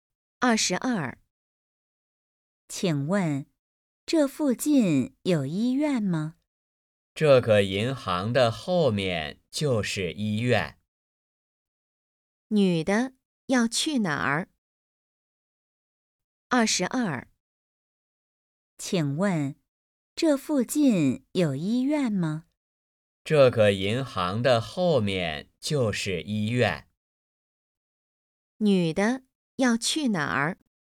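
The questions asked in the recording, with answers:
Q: 女的要去哪儿?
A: 医院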